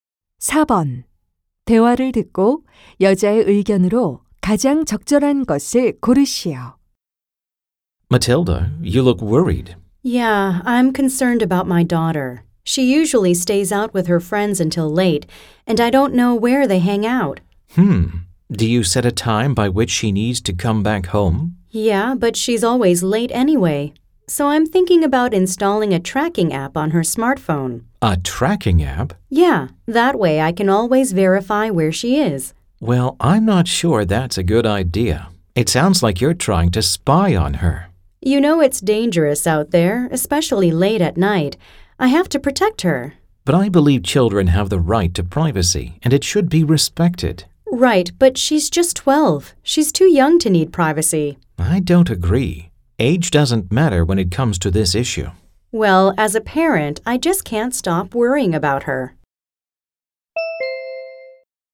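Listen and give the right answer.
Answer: 자녀의 사생활은 나이와 상관없이 존중되어야 한다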